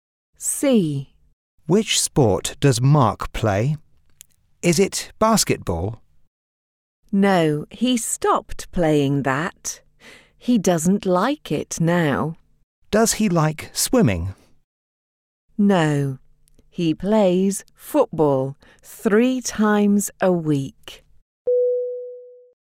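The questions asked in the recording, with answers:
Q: Which sport does Mark play?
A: Football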